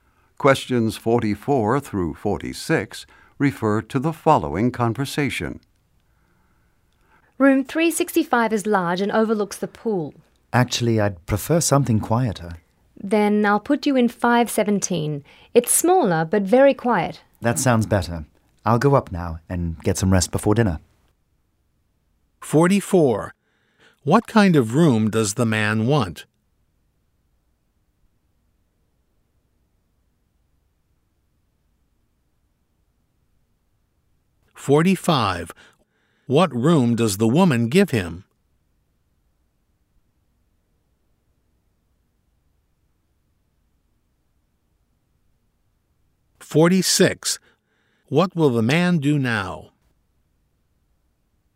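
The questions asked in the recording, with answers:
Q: What kind of room does the man want?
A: A quieter room

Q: What room does the woman give him?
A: Room 517

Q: What will the man do now?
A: Go up and rest before dinner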